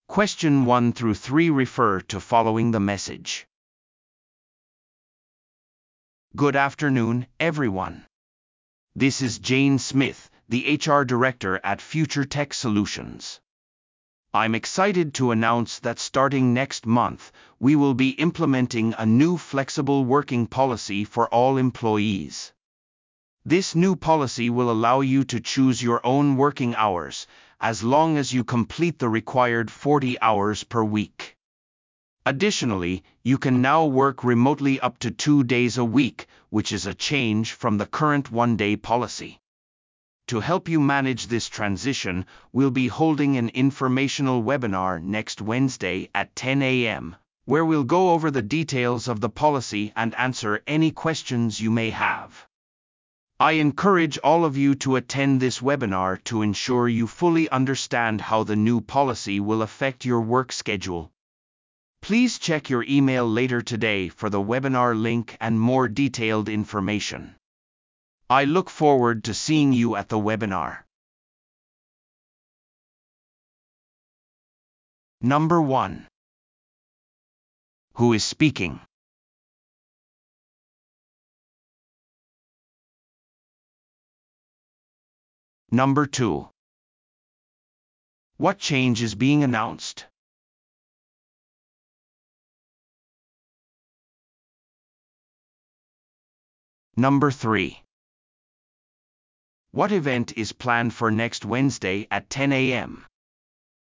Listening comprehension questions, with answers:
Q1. Who is speaking?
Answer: 人事部長

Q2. What change is being announced?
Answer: フレキシブル勤務制度

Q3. What event is planned for next Wednesday at 10 AM?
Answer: 情報セッション

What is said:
Good afternoon, everyone. This is Jane Smith, the HR Director at FutureTech Solutions. I'm excited to announce that starting next month, we will be implementing a new flexible working policy for all employees. This new policy will allow you to choose your own working hours, as long as you complete the required 40 hours per week. Additionally, you can now work remotely up to two days a week, which is a change from the current one-day policy.
To help you manage this transition, we'll be holding an informational webinar next Wednesday at 10 AM, where we'll go over the details of the policy and answer any questions you may have. I encourage all of you to attend this webinar to ensure you fully understand how the new policy will affect your work schedule.
Please check your email later today for the webinar link and more detailed information. I look forward to seeing you at the webinar.